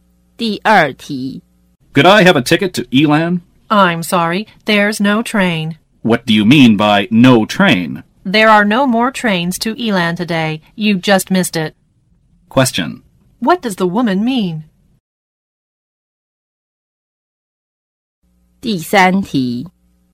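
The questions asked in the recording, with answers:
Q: What does the woman mean?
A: There are no more trains to Elan today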